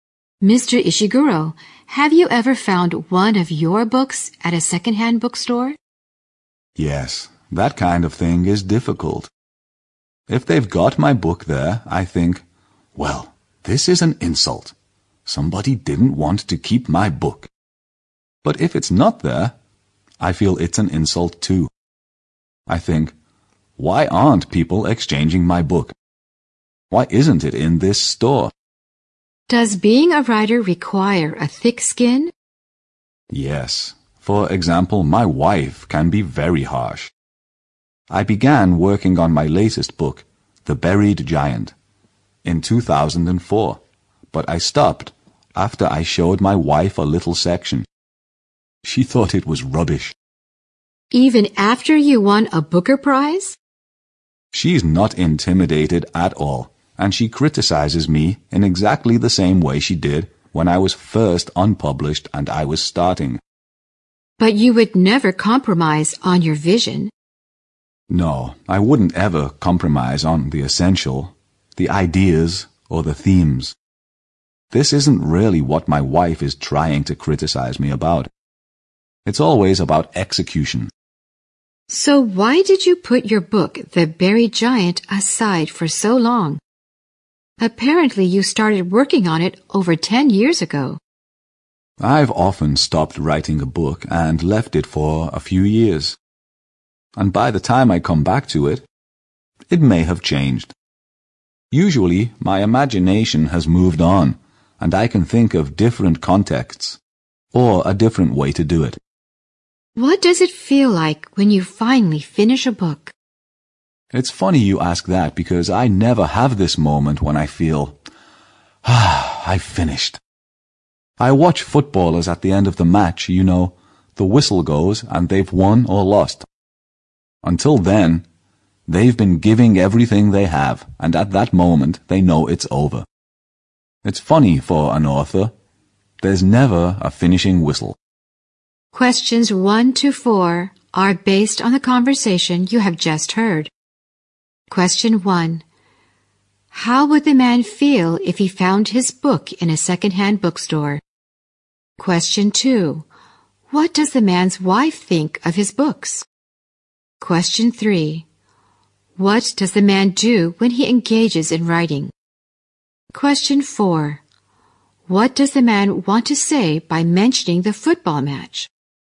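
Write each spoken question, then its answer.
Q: How would the man feel if he found his book in a second-hand bookstore?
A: He would feel insulted.

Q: What does the man's wife think of his books?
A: She is very critical of them; she thought part of his latest book was rubbish.

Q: What does the man want to say by mentioning the football match?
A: That an author never has a clear moment when a book is finished.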